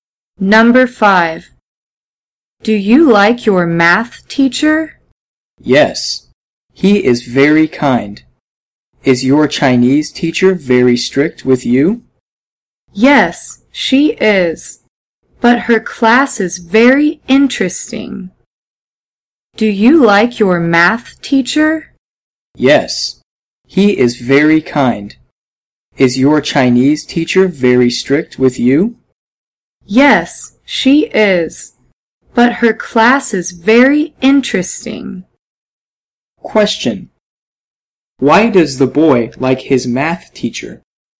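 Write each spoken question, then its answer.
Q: Why does the boy like his math teacher?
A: He is very kind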